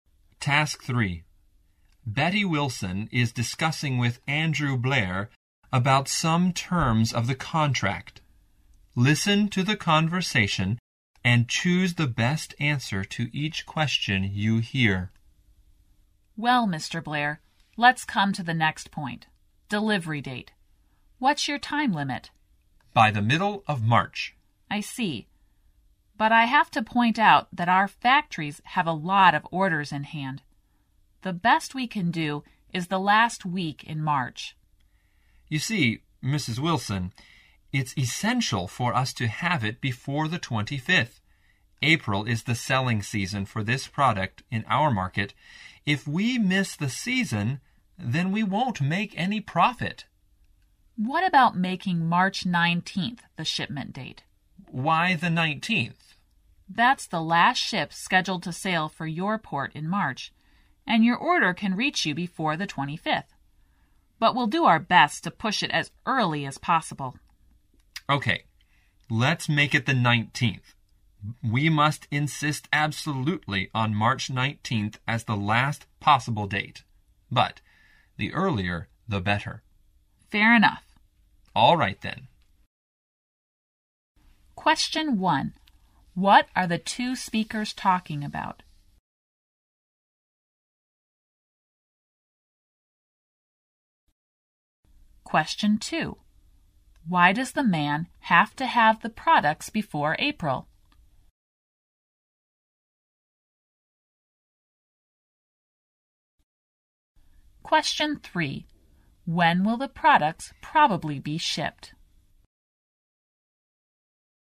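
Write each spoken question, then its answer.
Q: What are the two speakers talking about?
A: The delivery date

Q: Why does the man have to have the products before April?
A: April is the selling season for the product in his market

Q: When will the products probably be shipped?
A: On March 19th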